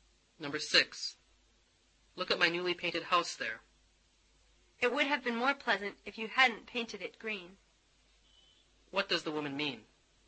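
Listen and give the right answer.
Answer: She doesn't like the green colour of the house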